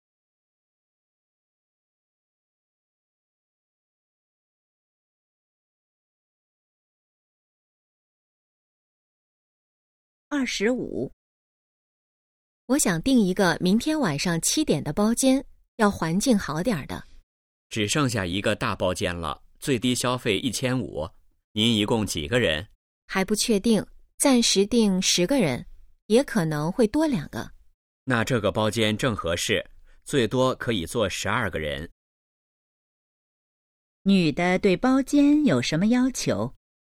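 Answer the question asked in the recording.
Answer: 环境好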